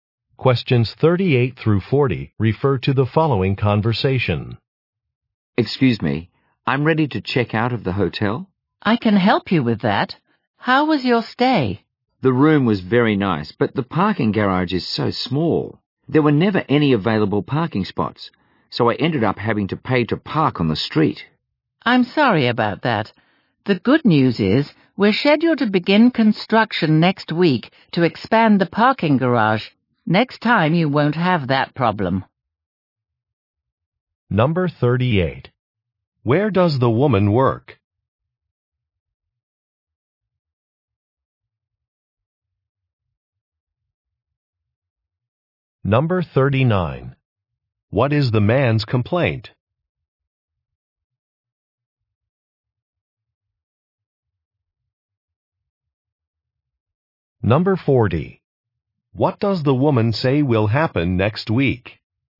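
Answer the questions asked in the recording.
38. At a hotel
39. The parking garage is too small
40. Construction to expand the parking garage will begin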